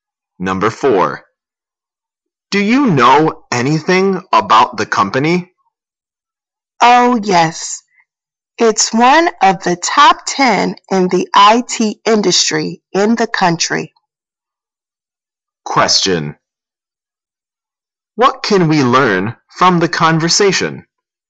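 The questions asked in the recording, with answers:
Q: What can we learn from the conversation?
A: The company is one of the top 10 in the IT industry in the country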